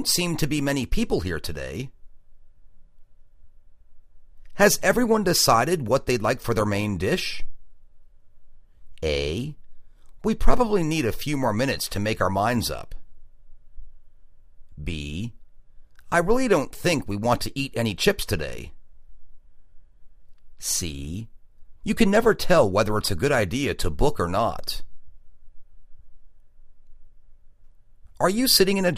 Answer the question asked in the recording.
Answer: We probably need a few more minutes to make our minds up.